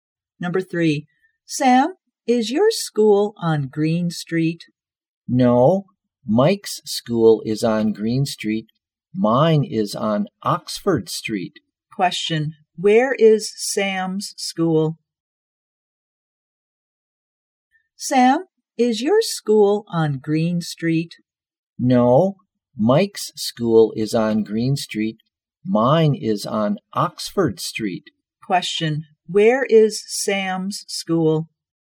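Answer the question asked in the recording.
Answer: On Oxford Street.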